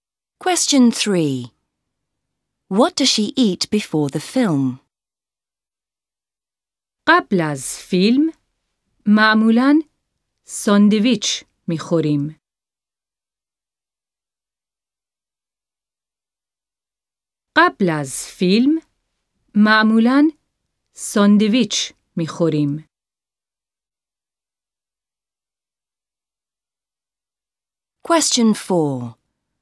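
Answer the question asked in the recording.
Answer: Sandwiches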